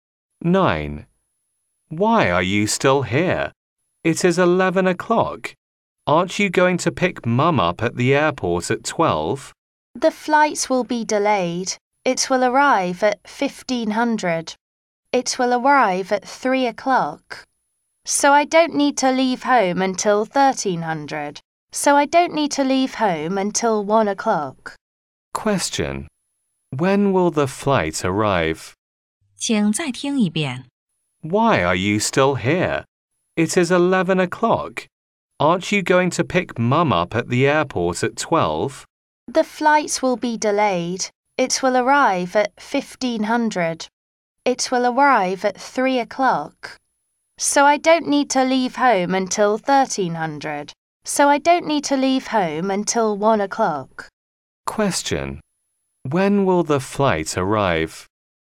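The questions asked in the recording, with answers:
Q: When will the flight arrive?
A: At 3 o'clock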